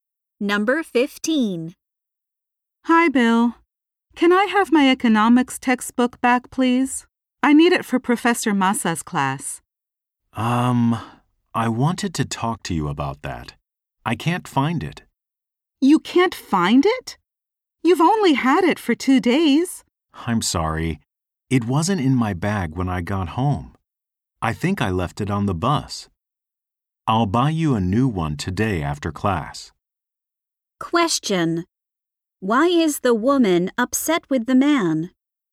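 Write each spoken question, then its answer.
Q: Why is the woman upset with the man?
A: He lost her economics textbook.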